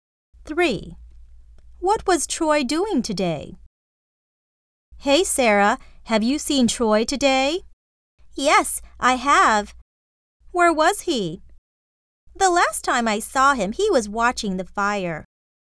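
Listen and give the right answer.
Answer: Watching the fire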